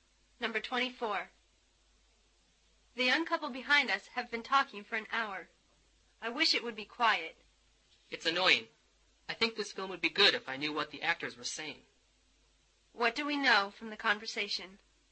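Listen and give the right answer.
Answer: The couple's talking keeps them from hearing the film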